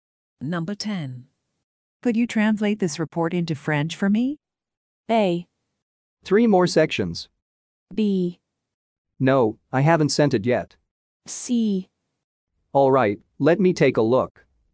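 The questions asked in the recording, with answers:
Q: Could you translate this report into French for me?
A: C: All right, let me take a look.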